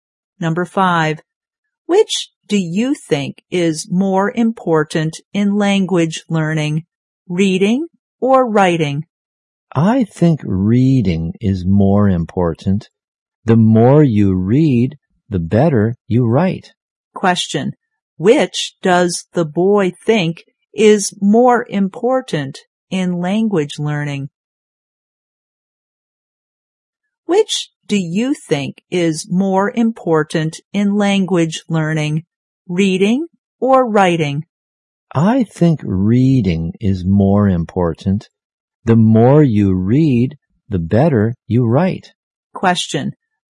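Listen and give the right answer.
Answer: Reading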